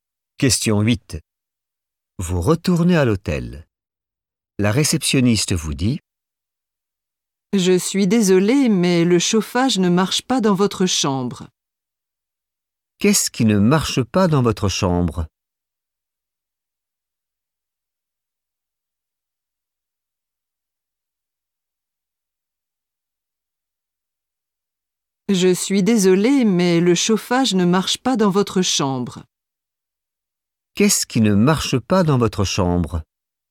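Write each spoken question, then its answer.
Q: Qu'est-ce qui ne marche pas dans votre chambre?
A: le chauffage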